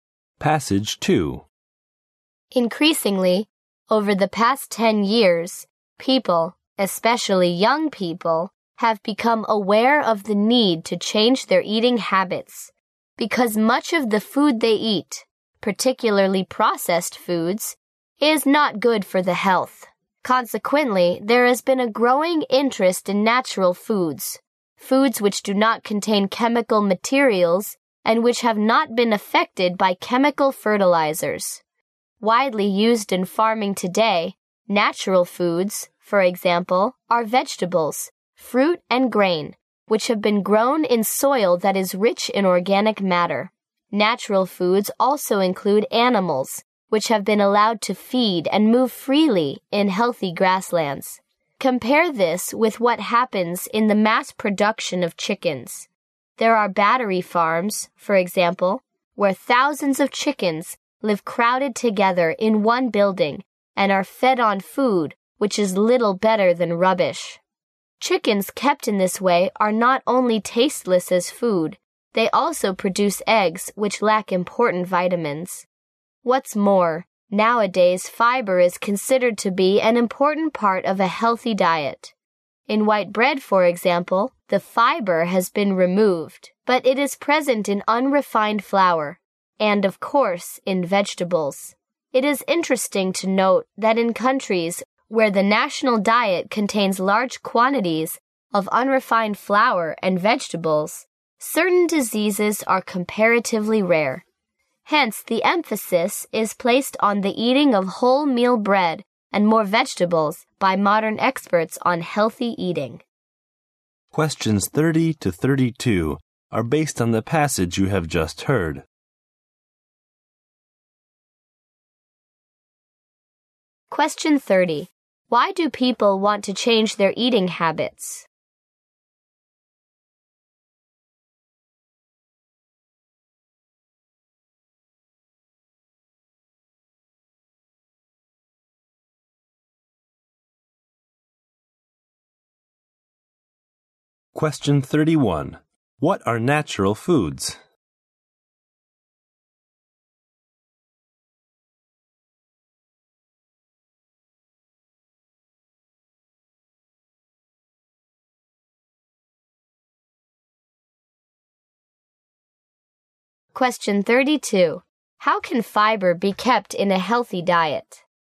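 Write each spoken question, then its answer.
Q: Why do people want to change their eating habits?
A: Much of the food they eat, especially processed food, is bad for health

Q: What are natural foods?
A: Foods without chemicals, not affected by chemical fertilizers

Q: How can fiber be kept in a healthy diet?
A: By eating wholemeal bread (unrefined flour) and more vegetables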